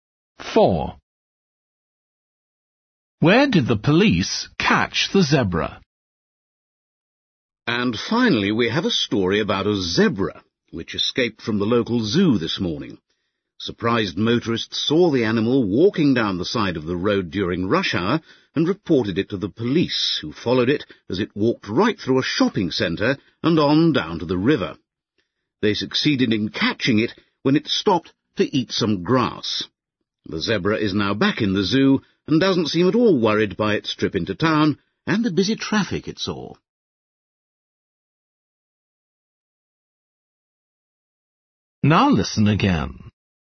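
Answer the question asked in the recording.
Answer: by the river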